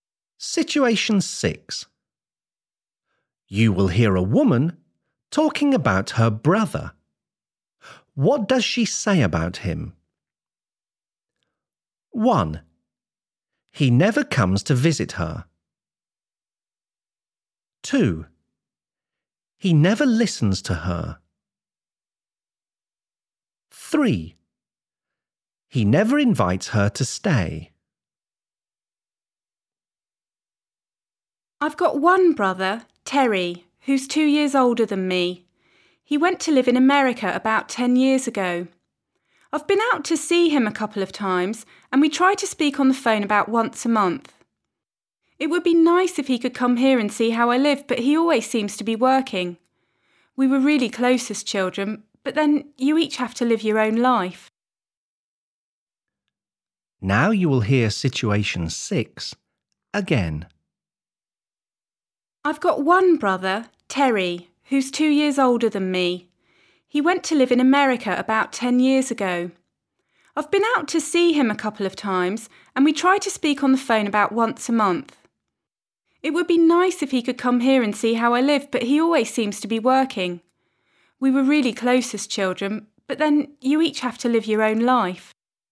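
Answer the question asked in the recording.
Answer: 1: He never comes to visit her.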